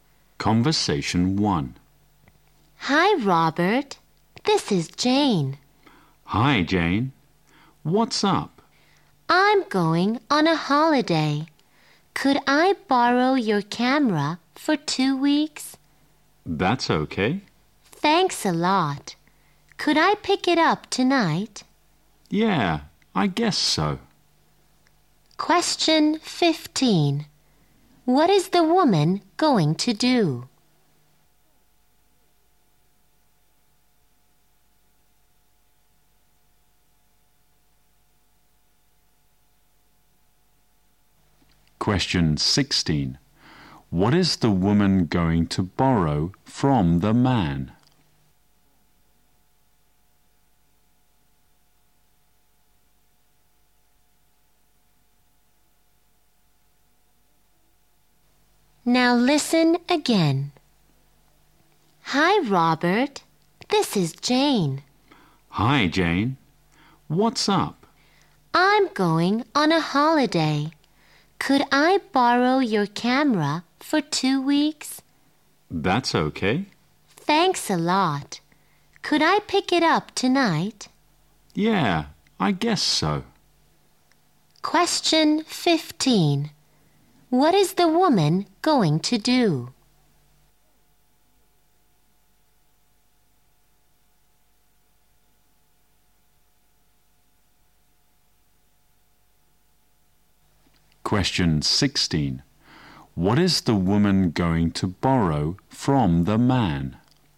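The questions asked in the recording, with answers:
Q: What is the woman going to do?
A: Go on a holiday

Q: What is the woman going to borrow from the man?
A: A camera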